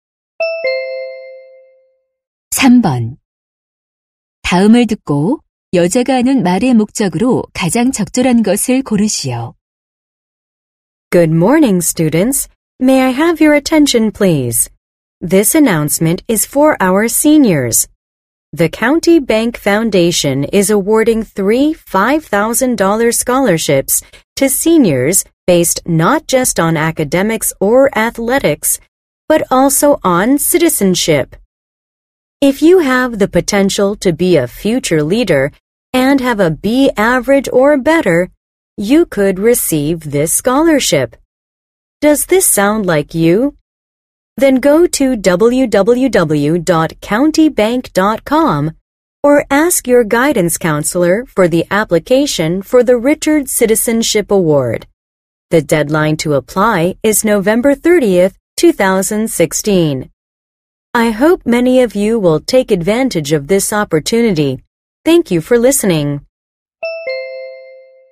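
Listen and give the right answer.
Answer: 장학금 신청을 안내하려고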